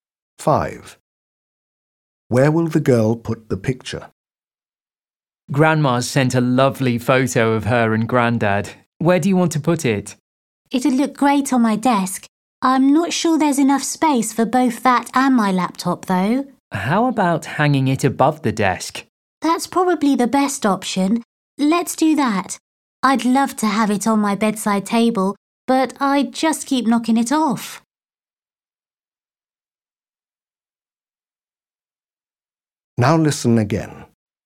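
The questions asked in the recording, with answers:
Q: Where will the girl put the picture?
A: On the wall above her desk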